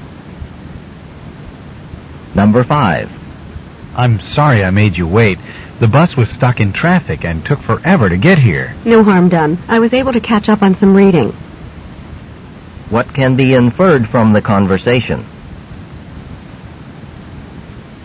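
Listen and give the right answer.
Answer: The man didn't mind waiting; he did some reading.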